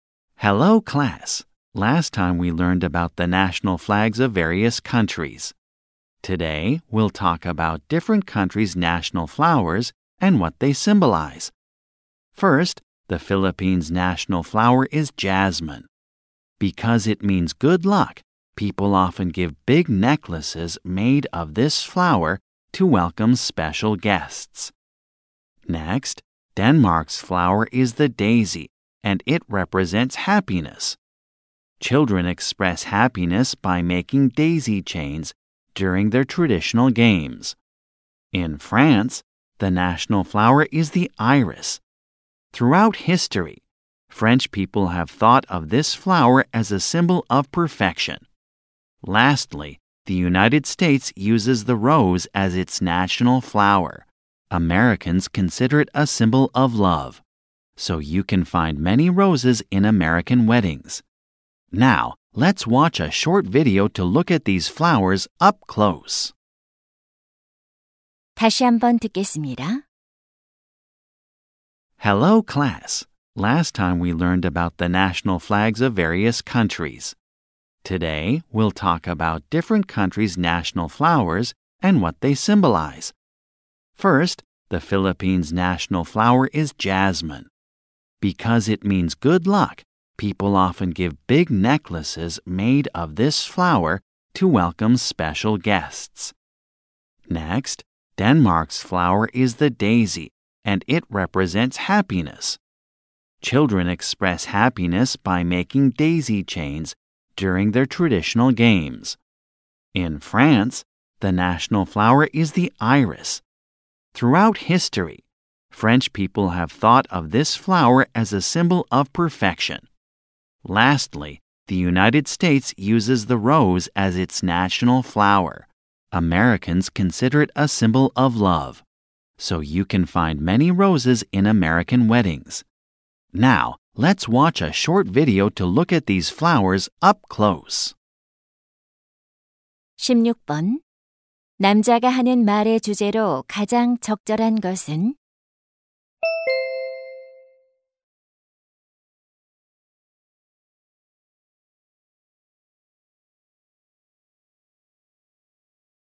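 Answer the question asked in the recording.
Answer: 여러 나라의 국화와 그 상징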